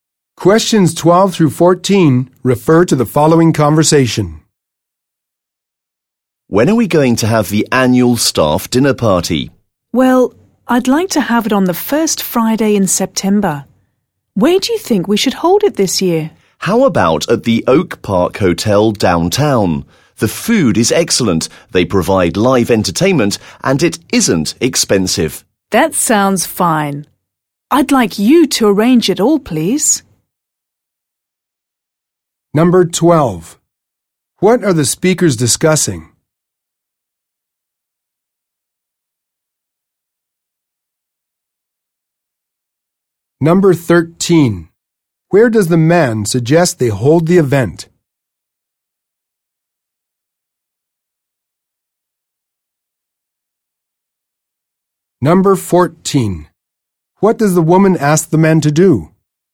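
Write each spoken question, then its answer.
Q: What are the speakers discussing?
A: The annual staff dinner party

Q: Where does the man suggest they hold the event?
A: At the Oak Park Hotel downtown

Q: What does the woman ask the man to do?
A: Arrange the party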